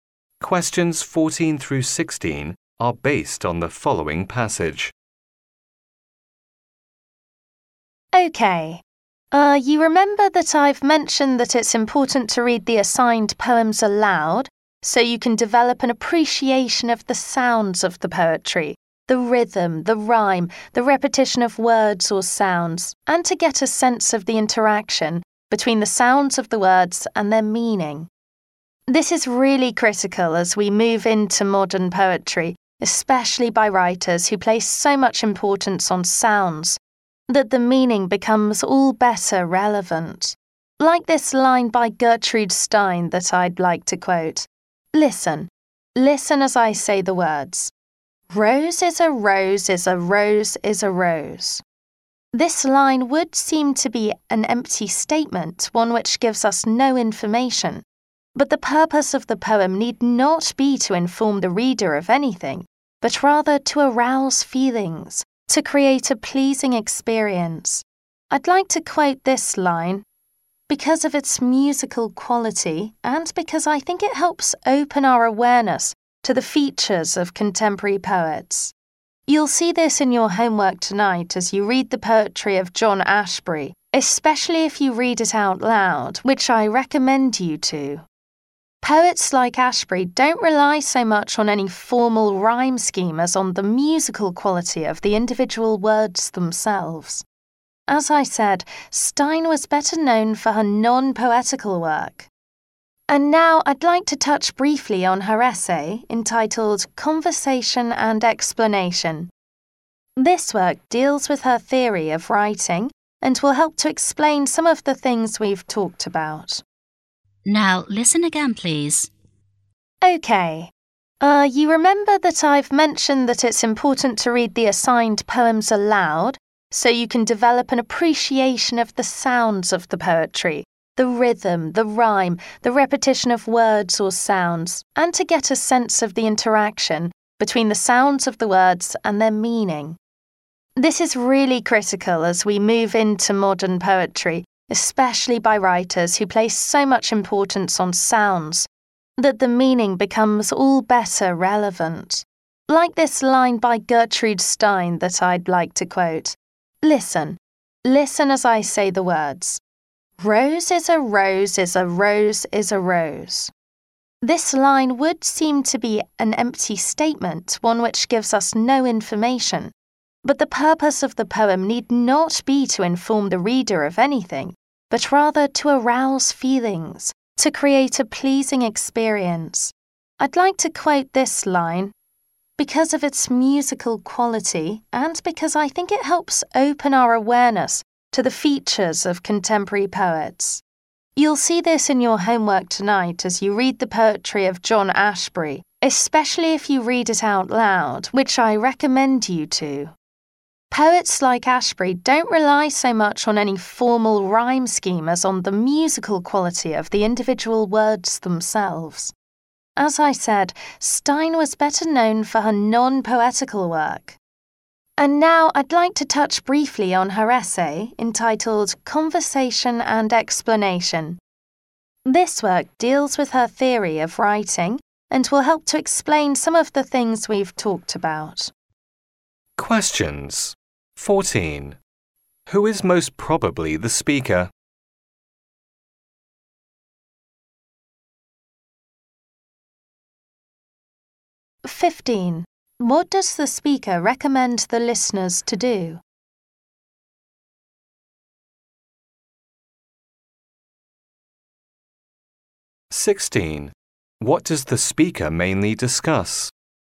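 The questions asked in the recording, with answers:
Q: Who is most probably the speaker?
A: A literature teacher

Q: What does the speaker recommend the listeners to do?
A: Read poems out loud.

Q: What does the speaker mainly discuss?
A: The importance of sound in modern poetry.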